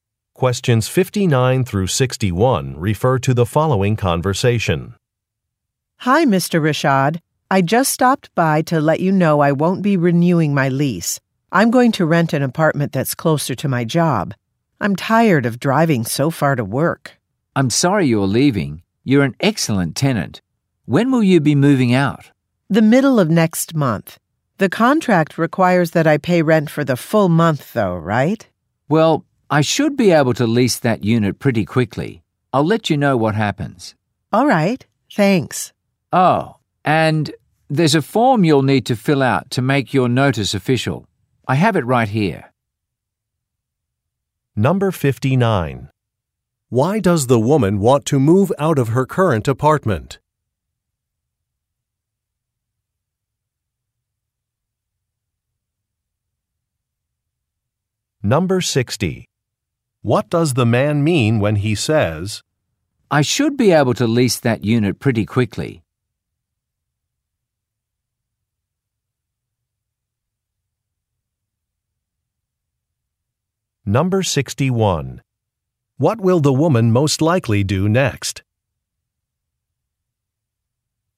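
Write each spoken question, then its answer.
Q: Why does the woman want to move out of her current apartment?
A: To live closer to her job

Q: What will the woman most likely do next?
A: Fill out a form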